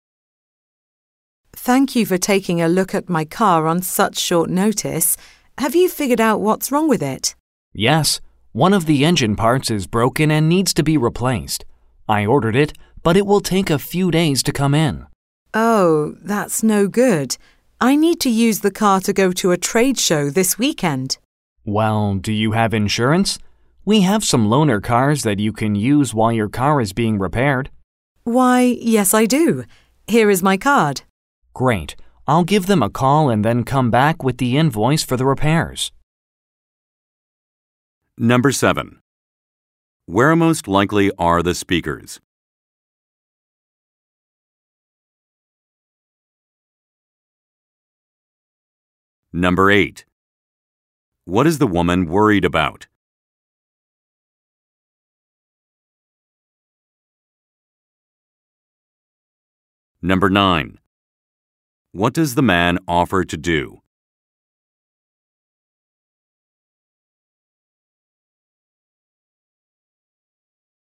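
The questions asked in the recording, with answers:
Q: Where most likely are the speakers?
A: At a car repair shop

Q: What is the woman worried about?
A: She needs her car to go to a trade show this weekend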